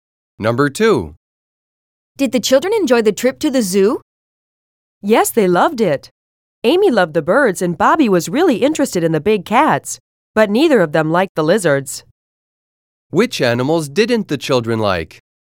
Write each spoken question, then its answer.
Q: Which animals didn't the children like?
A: The woman said that neither of the children liked the lizards.